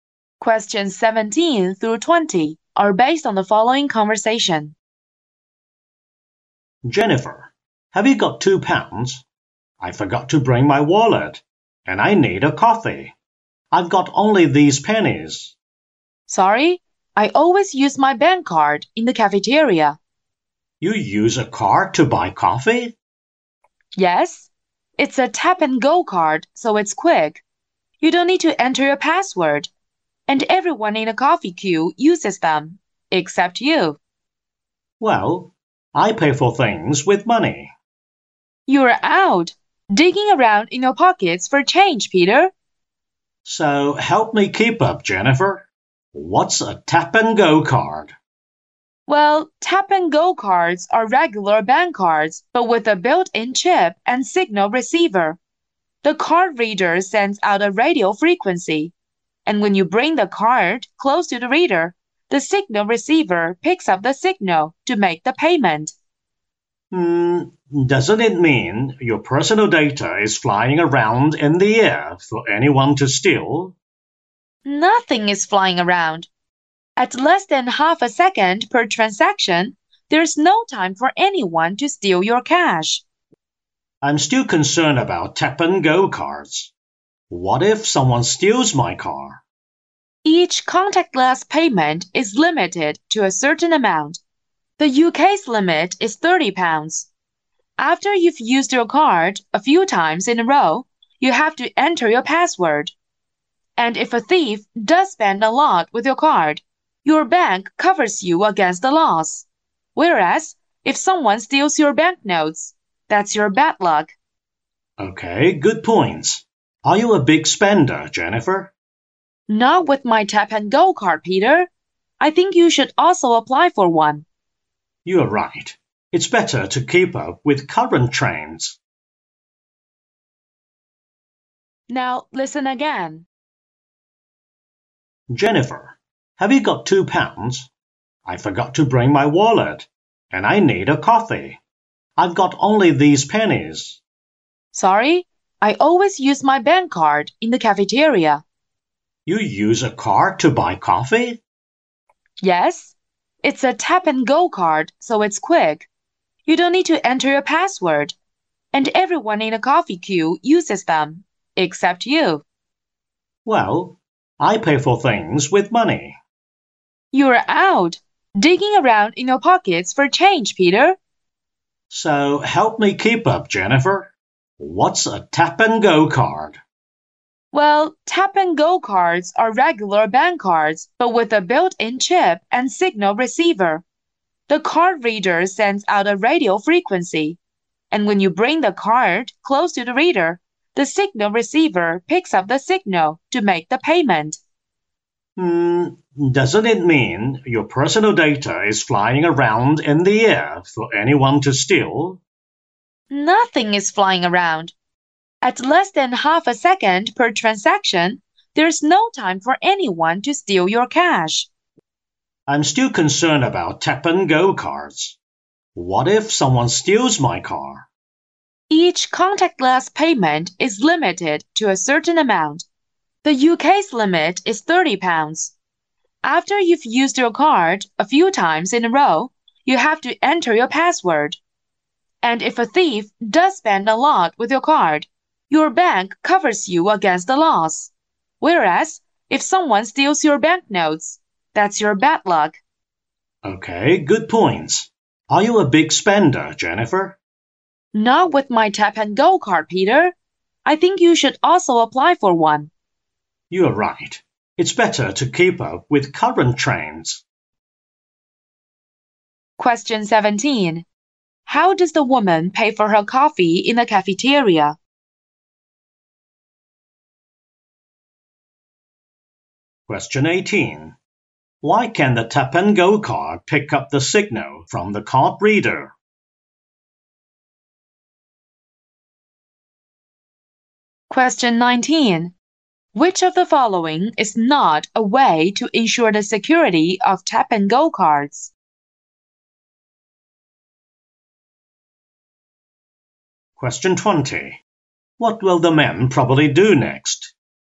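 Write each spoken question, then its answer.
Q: How does the woman pay for her coffee in the cafeteria?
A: With a tap-and-go bank card.

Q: Why can the tap-and-go card pick up the signal from the card reader?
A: It has a built-in chip and signal receiver.

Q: What will the men probably do next?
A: Apply for a tap-and-go card.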